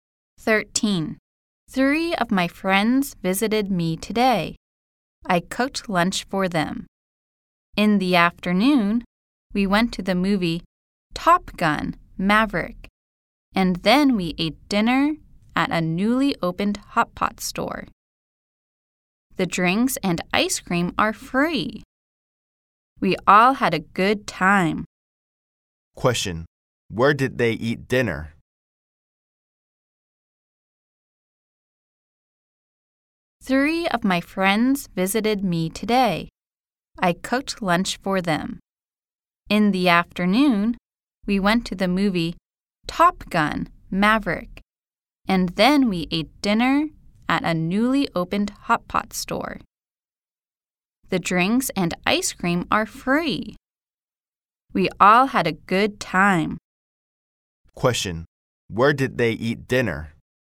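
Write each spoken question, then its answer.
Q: Where did they eat dinner?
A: At a newly opened hot pot store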